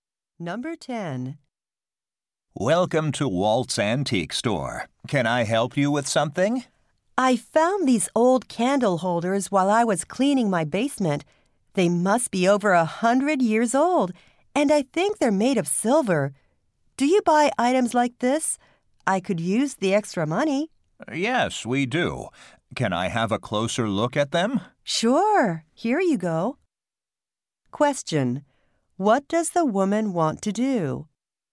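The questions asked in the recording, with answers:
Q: What does the woman want to do?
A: Sell her old candle holders.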